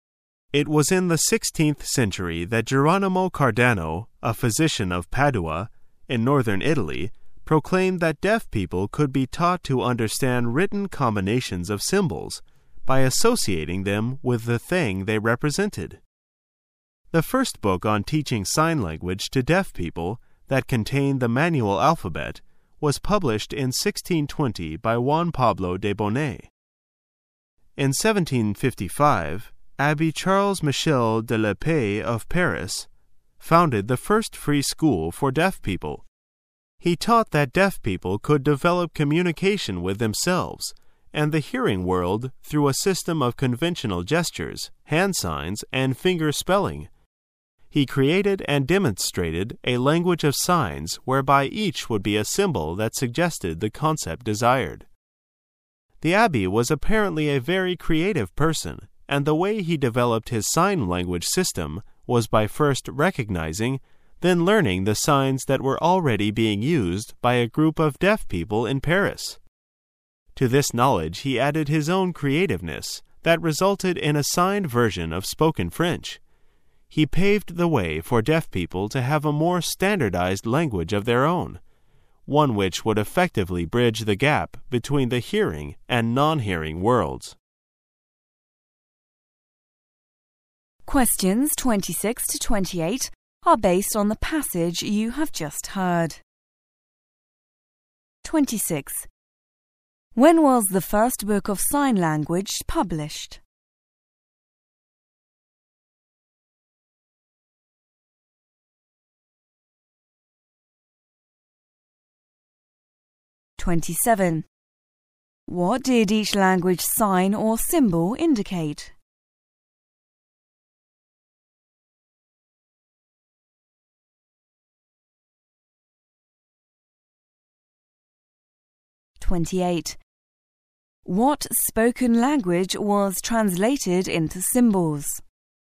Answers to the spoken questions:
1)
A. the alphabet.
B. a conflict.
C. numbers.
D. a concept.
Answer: D. a concept.
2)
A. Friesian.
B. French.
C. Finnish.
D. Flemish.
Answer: B. French.

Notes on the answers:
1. 此题考查细节的能力。解题的关键在于听到Can you believe that I used to be just like you?
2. 此题考查听细节的能力。解题的关键点在于听到Go to your bank when you get paid and open another account,"等发工资后到银行去另开一个账户"。saving account,储蓄账尸。

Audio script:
[解析] 26-28 It was in the sixteenth century that Geronimo Cardano, a physician of Padua, in northern Italy, proclaimed that deaf people could be taught to understand written combinations of symbols by associating them with the thing they represented. The first book on teaching sign language to deaf people that contained the manual alphabet was published in 1620 by Juan Pablo de Bonet. In 1755 Abbe Charles Michel de L'Epee of Paris founded the first free school for deaf people. He taught that deaf people could develop communication with themselves and the hearing world through a system of conventional gestures, hand signs, and fingerspelling. He created and demonstrated a language of signs whereby each would be a symbol that suggested the concept desired. The Abbe was apparently a very creative person, and the way he developed his sign language system was by first recognizing, then learning the signs that were already being used by a group of deaf people in Paris. To this knowledge he added his own creativeness that resulted in a signed version of spoken French. He paved the way for deaf people to have a more standardized language of their own -- one which would effectively bridge the gap between the hearing and non-hearing worlds. When was the first book of sign language published?